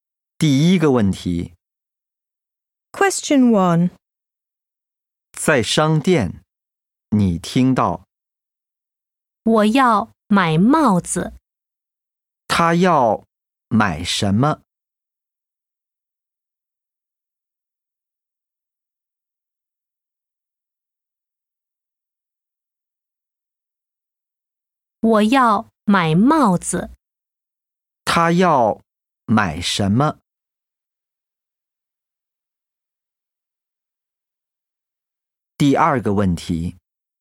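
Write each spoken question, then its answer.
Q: 他要买什么?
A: 帽子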